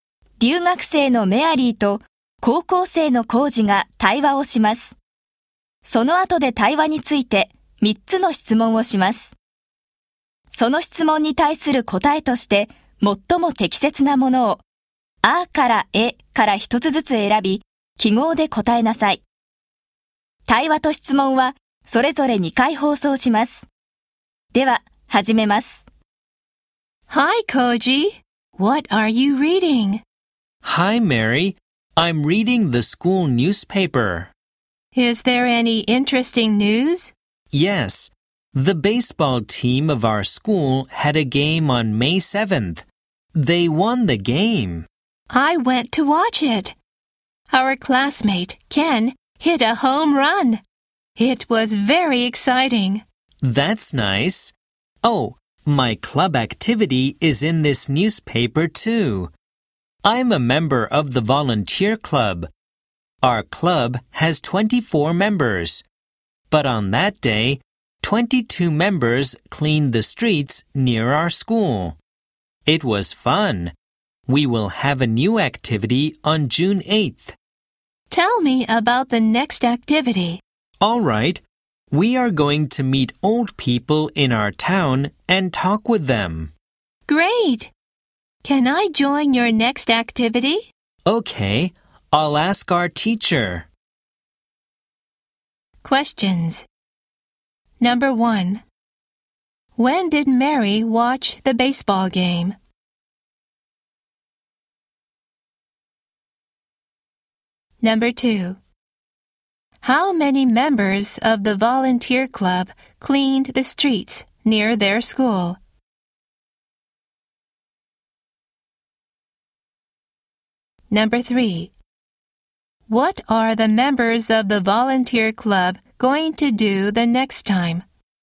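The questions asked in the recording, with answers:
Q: How many members of the volunteer club cleaned the streets near their school?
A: 22 members

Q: What are the members of the volunteer club going to do the next time?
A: Meet old people in their town and talk with them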